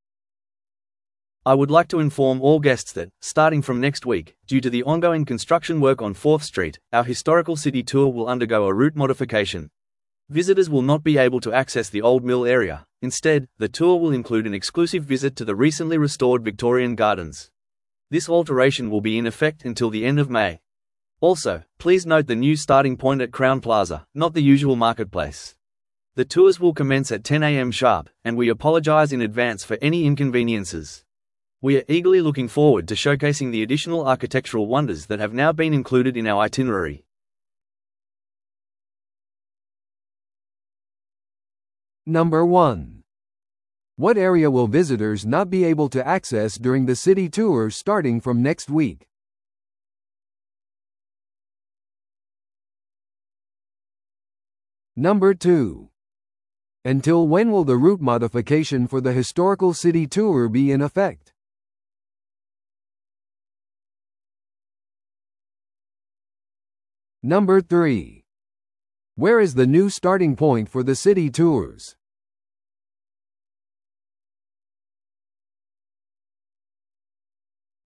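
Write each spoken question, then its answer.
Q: What area will visitors not be able to access during the city tour starting from next week?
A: The Old Mill area

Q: Until when will the route modification for the historical city tour be in effect?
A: Until the end of May

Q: Where is the new starting point for the city tours?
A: Crown Plaza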